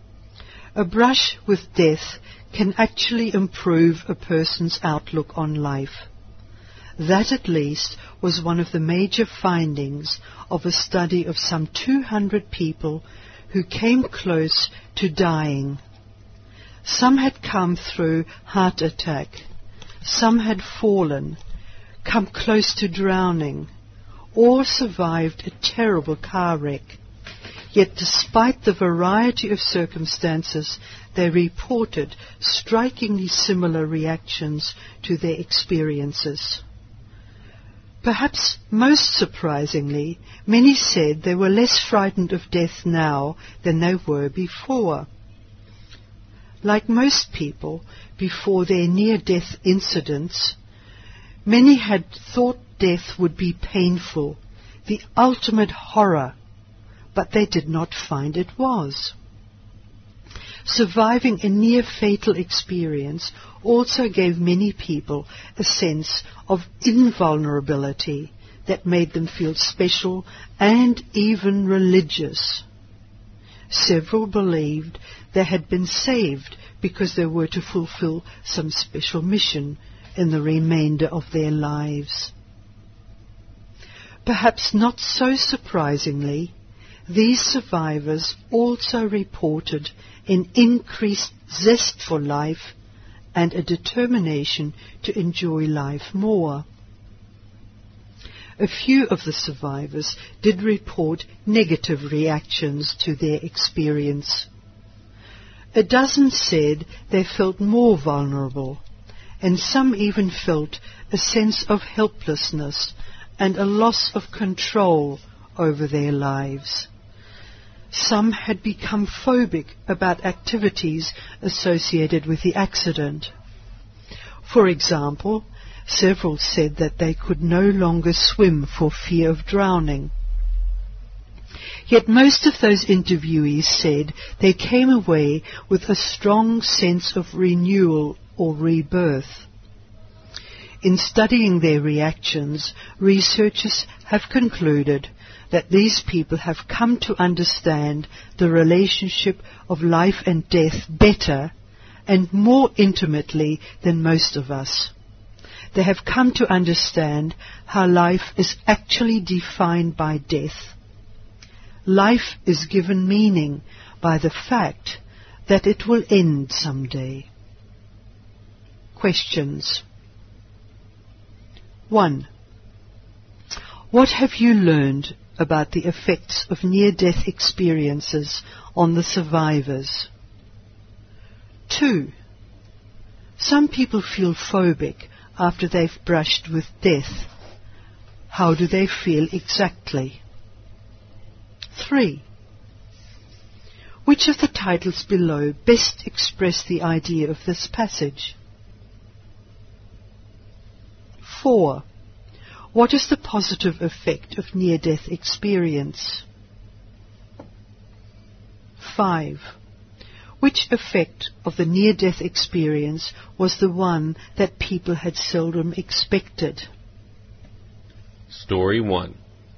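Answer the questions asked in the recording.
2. Afraid of activities linked to the accident, e.g. swimming for fear of drowning
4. Greater zest for life and less fear of death
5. They were less frightened of death than before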